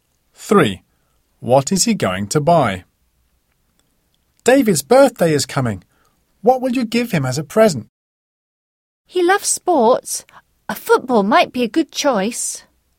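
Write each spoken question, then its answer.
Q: What is he going to buy?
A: A football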